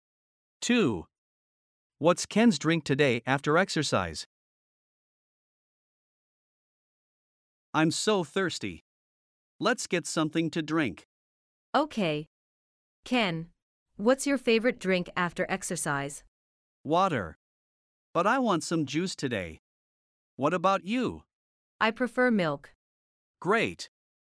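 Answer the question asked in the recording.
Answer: Juice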